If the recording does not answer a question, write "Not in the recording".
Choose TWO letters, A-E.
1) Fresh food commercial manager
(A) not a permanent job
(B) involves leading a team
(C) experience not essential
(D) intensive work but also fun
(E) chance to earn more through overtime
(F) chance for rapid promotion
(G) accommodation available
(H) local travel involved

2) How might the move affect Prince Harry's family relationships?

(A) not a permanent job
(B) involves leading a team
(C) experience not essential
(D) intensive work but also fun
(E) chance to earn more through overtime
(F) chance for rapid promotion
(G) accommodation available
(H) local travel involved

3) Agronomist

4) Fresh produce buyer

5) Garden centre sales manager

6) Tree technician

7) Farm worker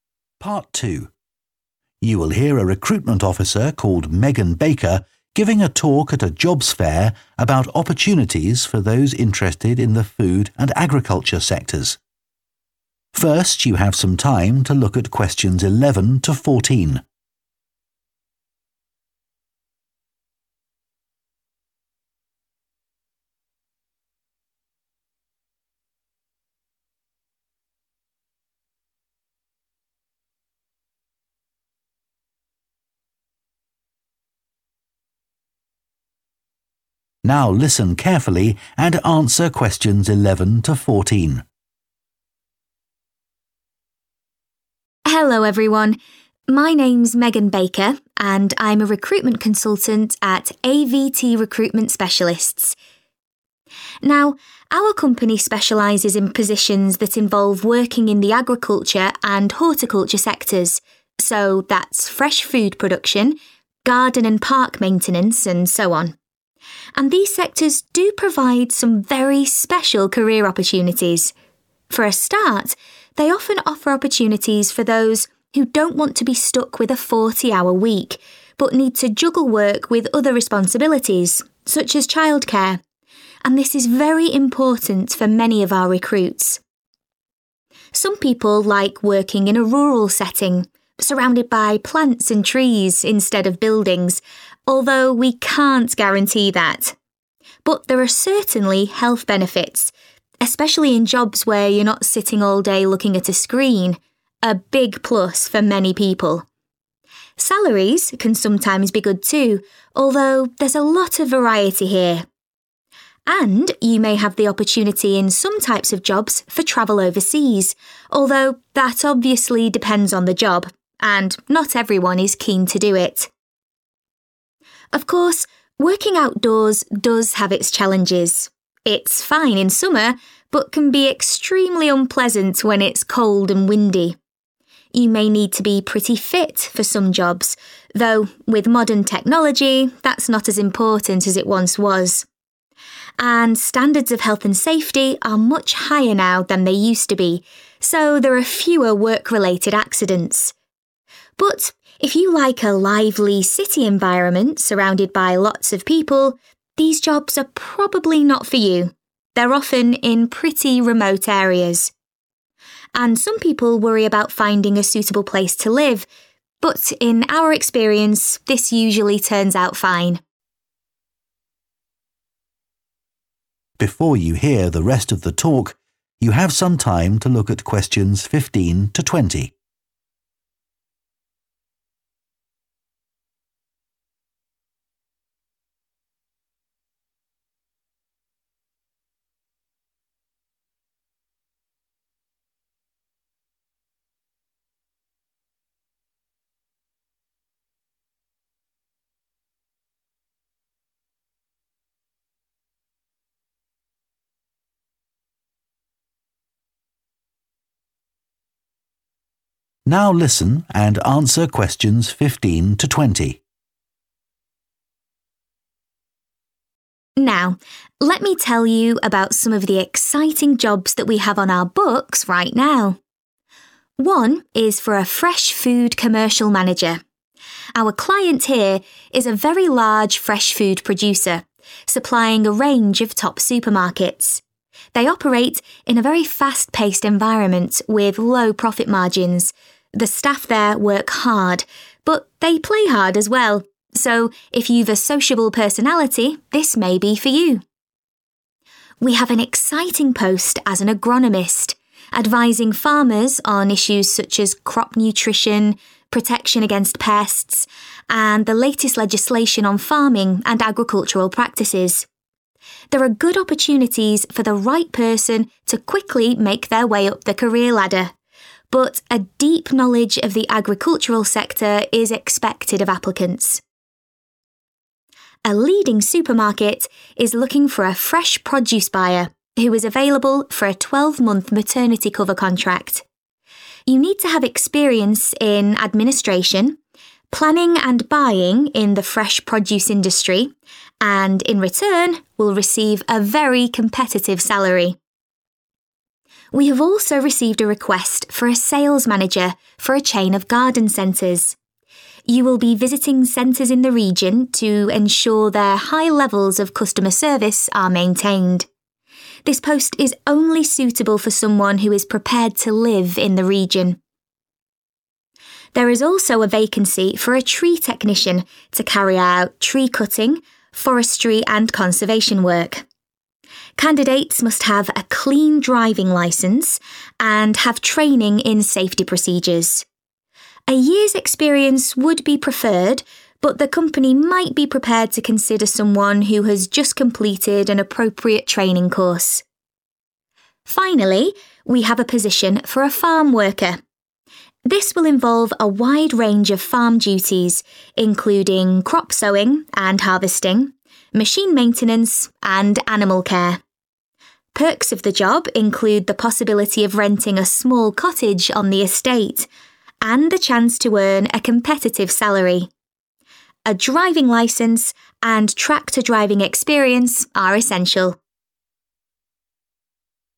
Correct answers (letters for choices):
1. D
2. Not in the recording
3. F
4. A
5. H
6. C
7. G